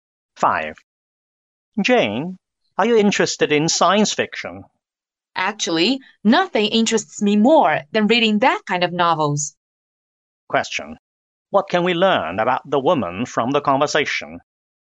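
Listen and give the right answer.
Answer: She is very interested in science fiction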